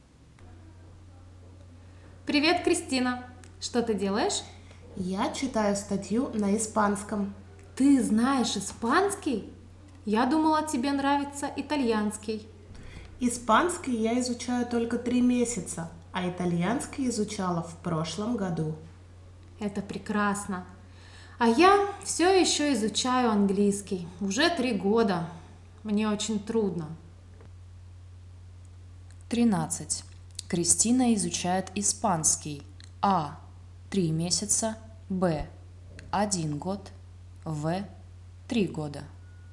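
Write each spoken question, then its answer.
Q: Кристина изучает испанский. А. 3 месяца. Б. 1 год. В. 3 года.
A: А: 3 месяца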